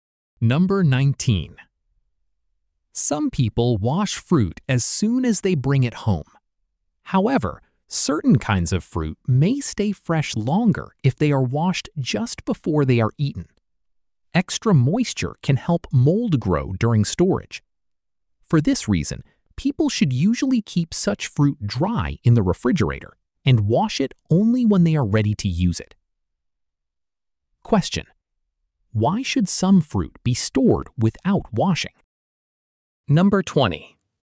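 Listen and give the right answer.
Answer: Extra moisture can help mold grow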